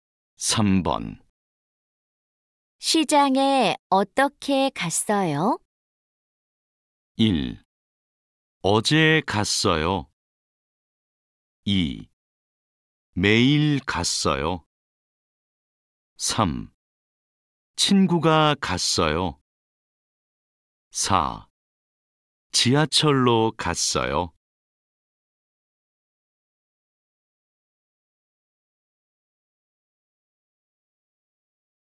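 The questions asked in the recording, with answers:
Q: 시장에어떻게갔어요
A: 4: 지하철로갔어요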